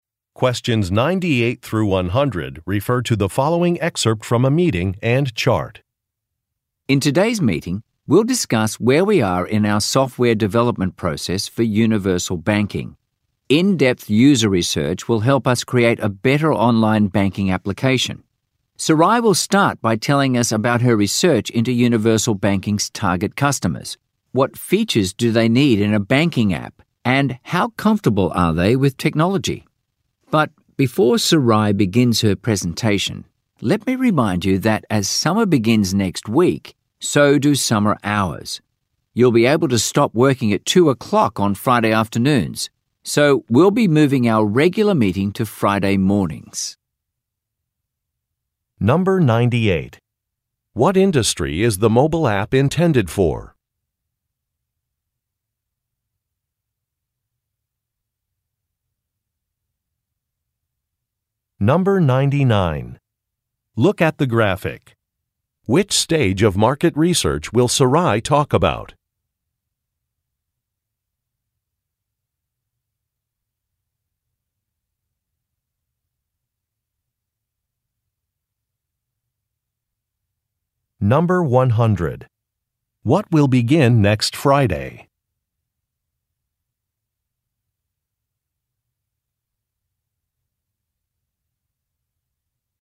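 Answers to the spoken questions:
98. Banking
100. Summer hours (finishing work at 2 o'clock on Fridays)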